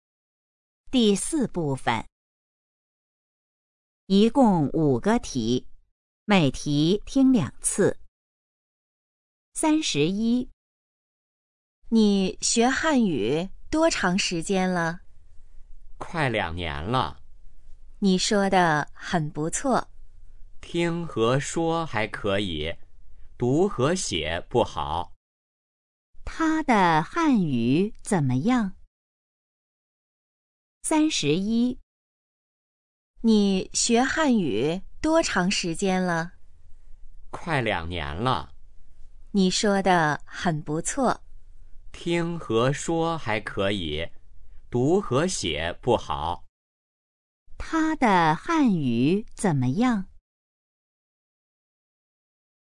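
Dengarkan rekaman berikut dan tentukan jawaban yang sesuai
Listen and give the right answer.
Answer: 听和说还可以,读和写不好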